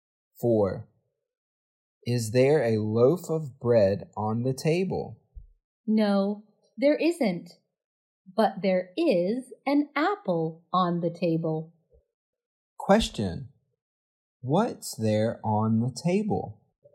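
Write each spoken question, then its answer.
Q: What's there on the table?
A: An apple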